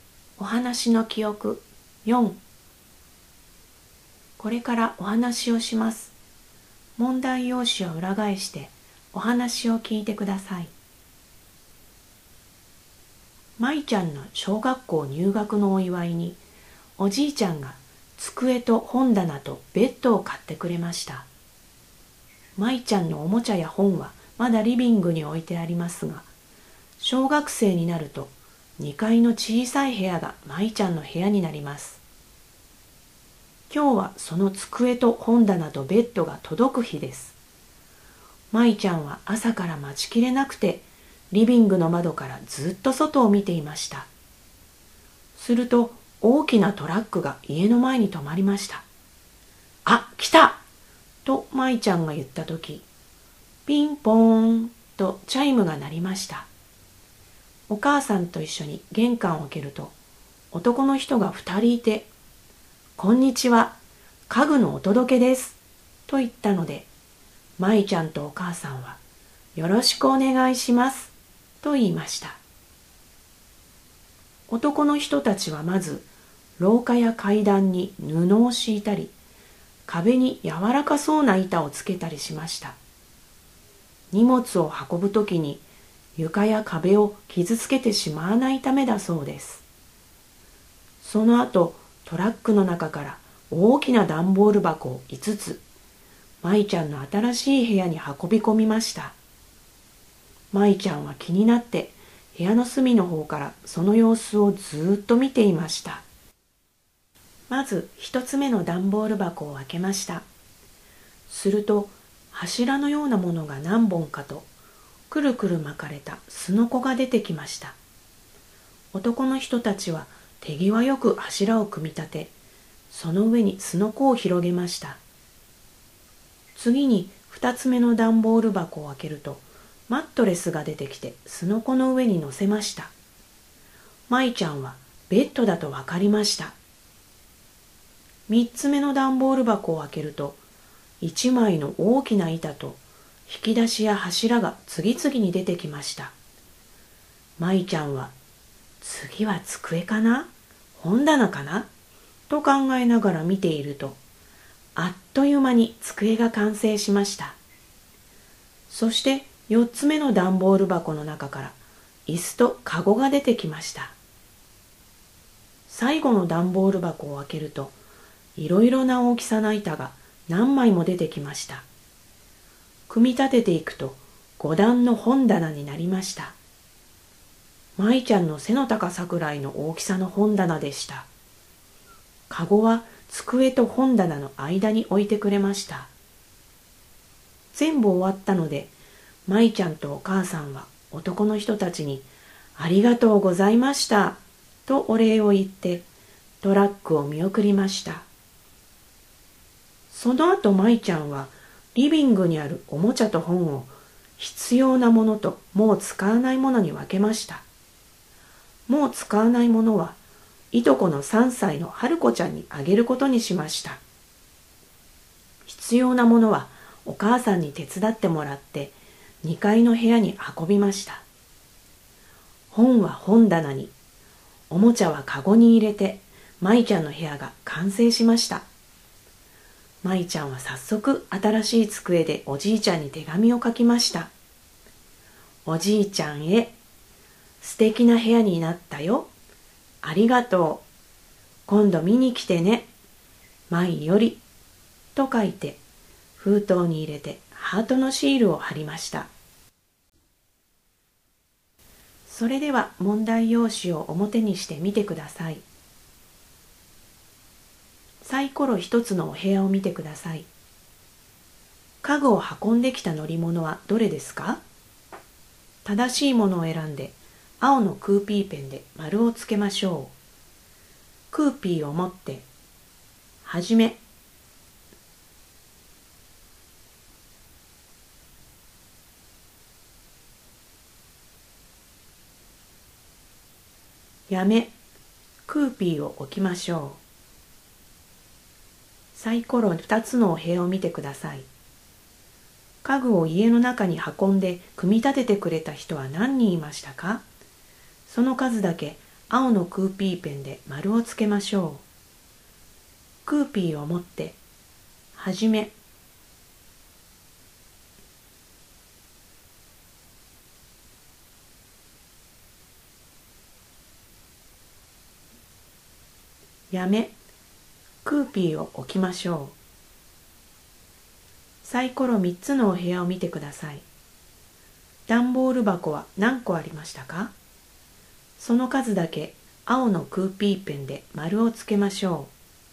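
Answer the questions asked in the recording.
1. トラック
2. 2人
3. 5個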